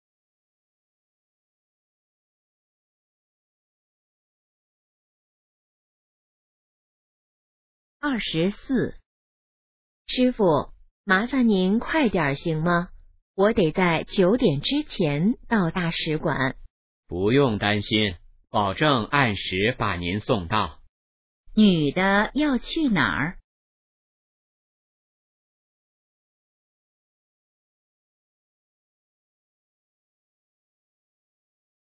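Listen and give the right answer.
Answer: 大使馆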